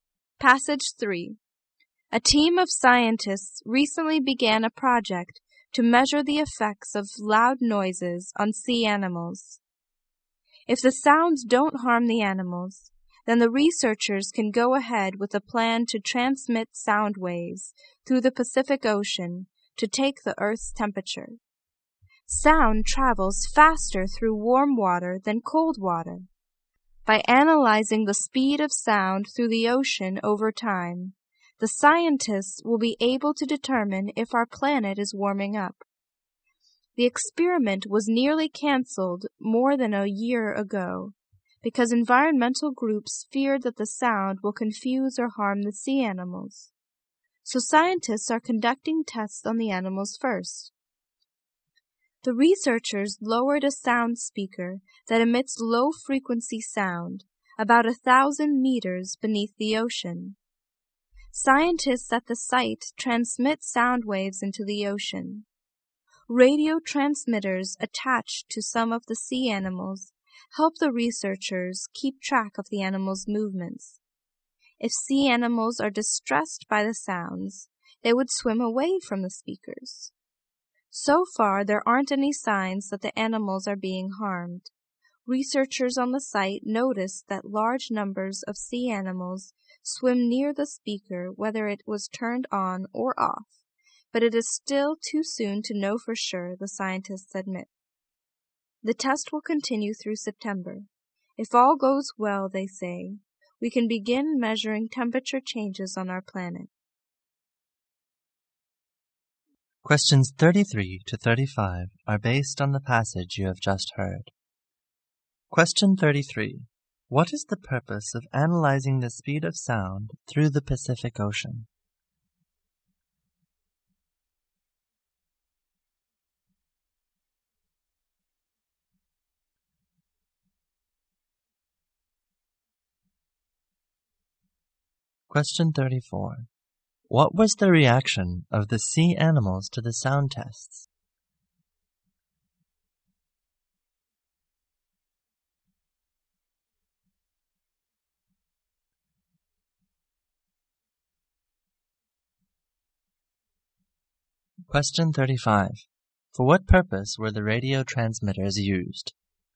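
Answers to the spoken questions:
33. To find out whether the Earth is warming up.
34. There were no signs of harm; many swam near the speaker.
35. To track the sea animals' movements.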